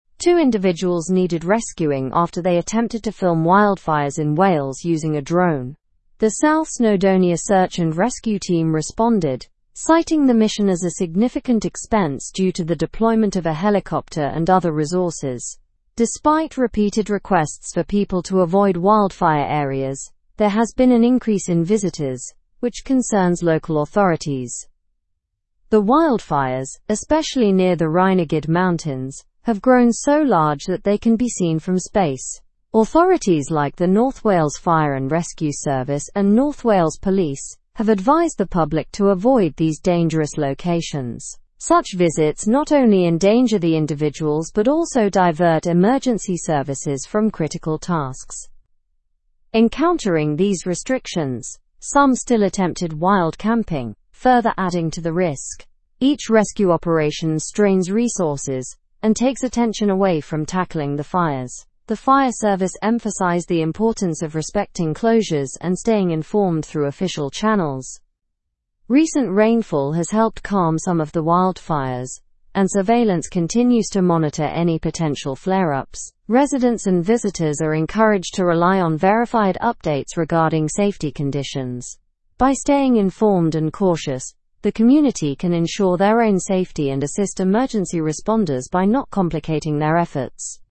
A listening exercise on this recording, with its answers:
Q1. What did the individuals need rescuing for?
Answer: They attempted to film wildfires in Wales using a drone.

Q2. Who responded to the rescue mission?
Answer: The South Snowdonia Search and Rescue Team responded.

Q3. What did the deployment of the rescue team entail?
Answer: It entailed a significant expense, including the use of a helicopter and other resources.

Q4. What advice have authorities given to the public?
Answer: Authorities have advised the public to avoid dangerous locations near the wildfires.

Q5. How do rescue operations affect resources?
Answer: Each rescue operation strains resources and takes attention away from tackling the fires.

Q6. What impact has recent rainfall had on the wildfires?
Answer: Recent rainfall has helped calm some of the wildfires.

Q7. Why is staying informed through official channels important?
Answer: Staying informed ensures safety and helps assist emergency responders by not complicating their efforts.

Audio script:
Two individuals needed rescuing after they attempted to film wildfires in Wales using a drone. The South Snowdonia Search and Rescue Team responded, citing the mission as a significant expense due to the deployment of a helicopter and other resources. Despite repeated requests for people to avoid wildfire areas, there has been an increase in visitors, which concerns local authorities.
The wildfires, especially near the Rhinogydd mountains, have grown so large that they can be seen from space. Authorities like the North Wales Fire and Rescue Service and North Wales Police have advised the public to avoid these dangerous locations. Such visits not only endanger the individuals but also divert emergency services from critical tasks.
Encountering these restrictions, some still attempted wild camping, further adding to the risk. Each rescue operation strains resources and takes attention away from tackling the fires. The fire service emphasized the importance of respecting closures and staying informed through official channels.
Recent rainfall has helped calm some of the wildfires, and surveillance continues to monitor any potential flare-ups. Residents and visitors are encouraged to rely on verified updates regarding safety conditions. By staying informed and cautious, the community can ensure their own safety and assist emergency responders by not complicating their efforts.

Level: Level 3